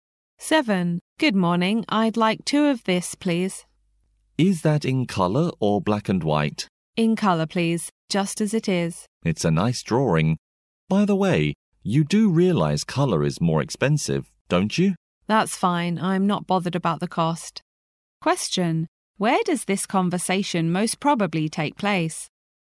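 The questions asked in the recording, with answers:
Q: Where does this conversation most probably take place?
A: At a copy shop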